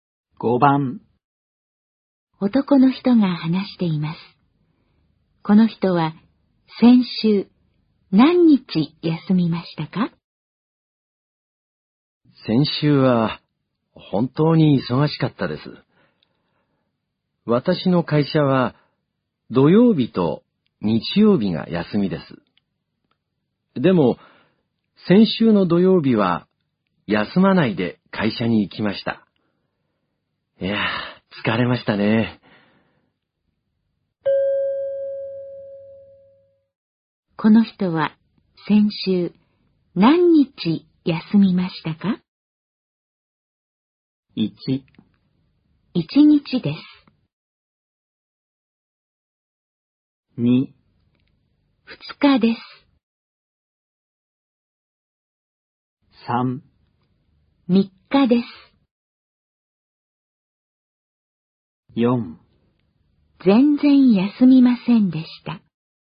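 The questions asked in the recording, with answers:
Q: この人は先週何日休みましたか?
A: 1: 1日です。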